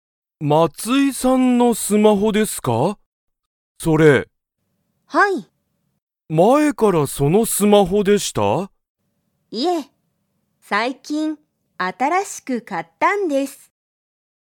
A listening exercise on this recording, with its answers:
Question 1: 松井まついさんは、前まえからそのスマホでしたか?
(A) はい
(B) いいえ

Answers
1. (B) いいえ

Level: Level 1

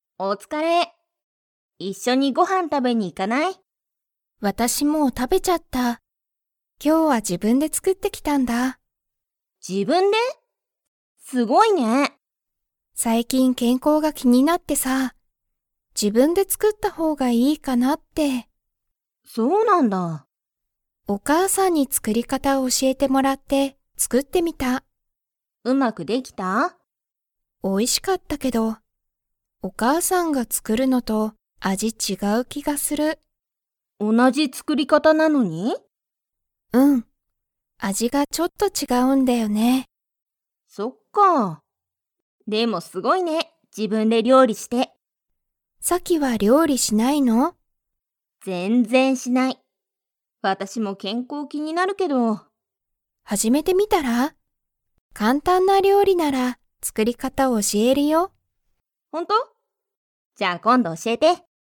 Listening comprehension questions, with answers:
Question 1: みほはご飯はんを 。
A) まだ食たべてない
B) もう食たべちゃった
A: B) もう食たべちゃった

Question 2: みほは料理りょうりの作つくり方かたを誰だれに教おしえてもらいましたか?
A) さき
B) お父とうさん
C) お母かあさん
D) 夫おっと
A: C) お母かあさん

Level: Level 3

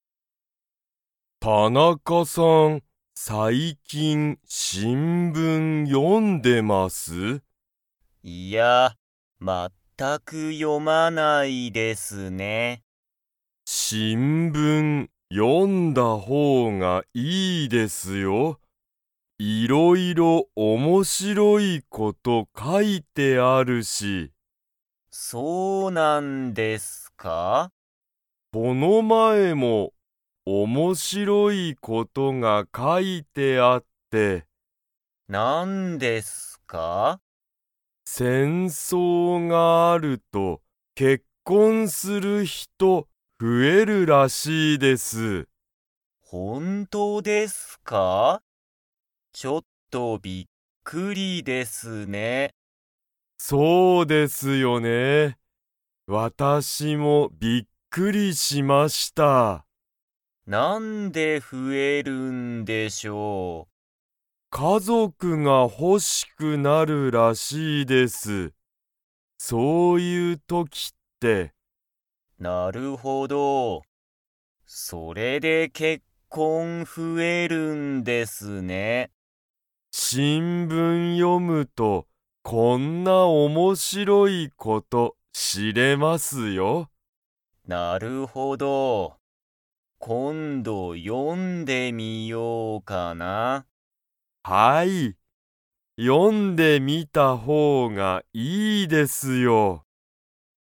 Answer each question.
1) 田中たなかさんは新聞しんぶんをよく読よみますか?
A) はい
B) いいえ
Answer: B) いいえ

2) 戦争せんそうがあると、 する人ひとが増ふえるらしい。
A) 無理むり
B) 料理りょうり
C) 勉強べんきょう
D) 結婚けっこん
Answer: D) 結婚けっこん

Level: Level 3

